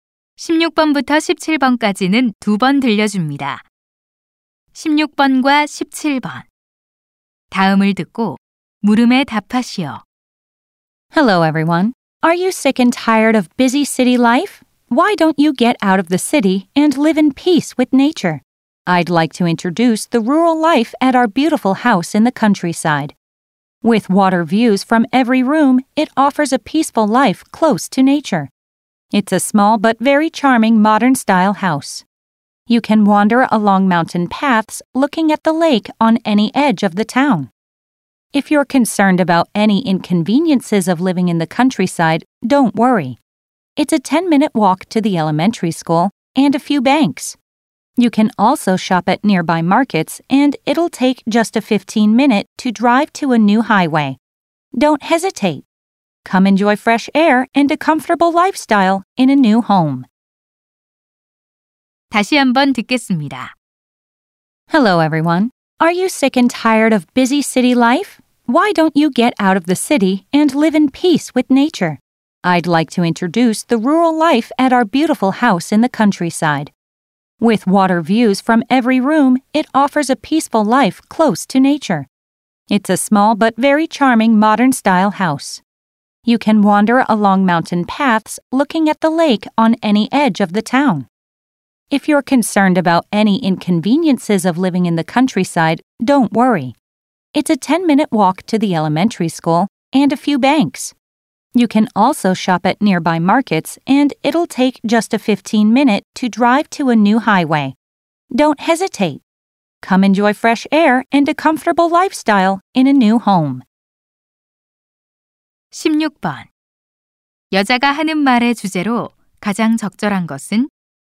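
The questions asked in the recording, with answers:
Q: 여자가 하는 말의 주제로 가장 적절한 것은?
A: 시골 전원주택 소개(광고)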